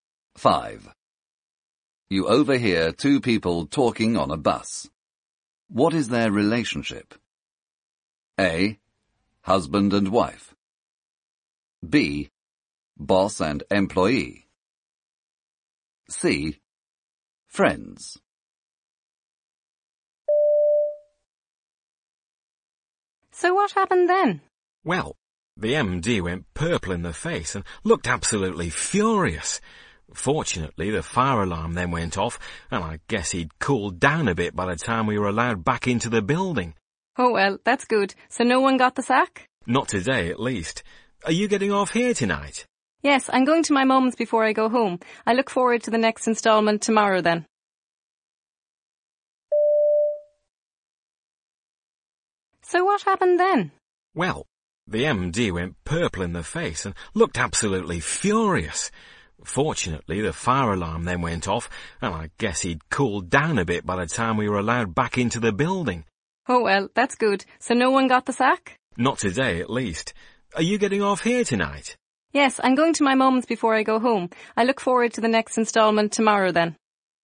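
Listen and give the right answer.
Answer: C: Friends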